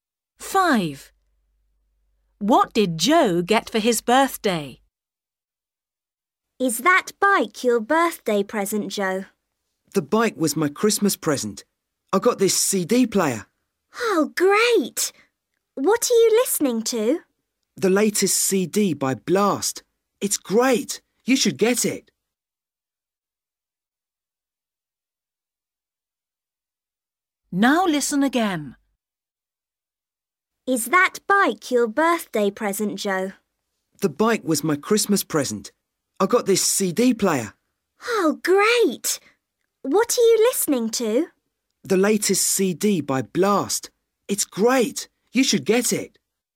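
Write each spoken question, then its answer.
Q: What did Joe get for his birthday?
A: a CD player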